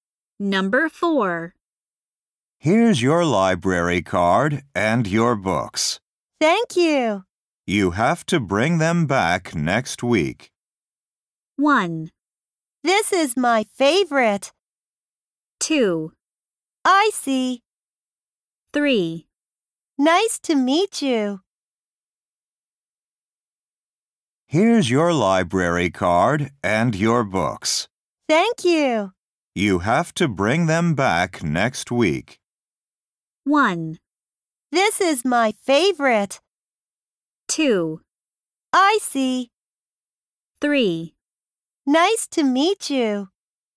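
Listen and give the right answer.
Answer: 2: I see.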